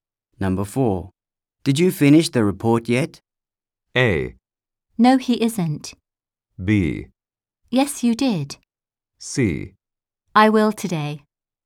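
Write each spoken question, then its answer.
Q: Did you finish the report yet?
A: C: I will today.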